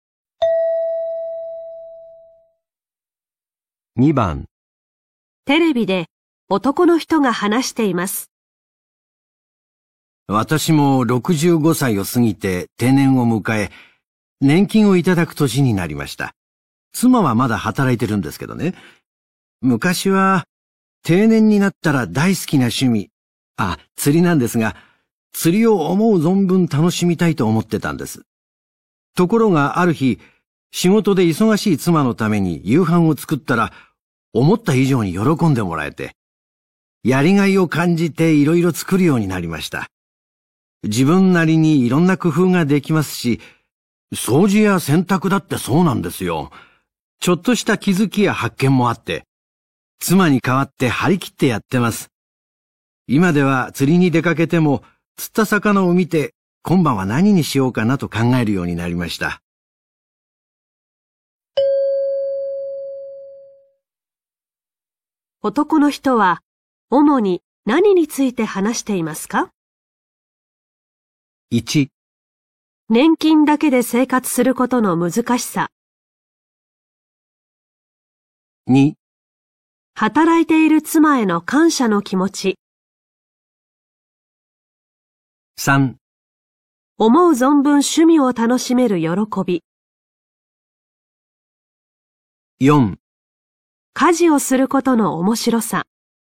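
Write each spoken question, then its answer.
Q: 男の人は主に何について話していますか?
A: 4: 家事をすることの面白さ。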